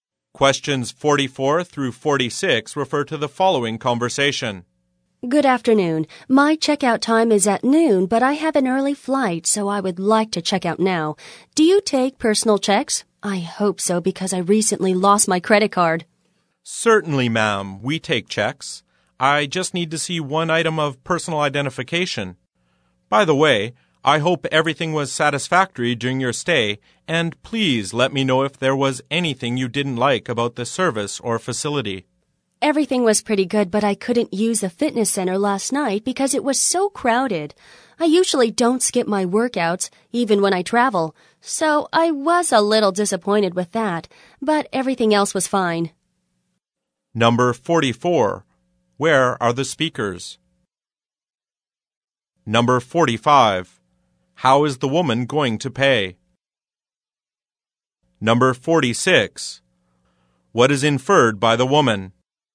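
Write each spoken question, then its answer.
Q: Where are the speakers?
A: At a hotel front desk

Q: How is the woman going to pay?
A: By personal check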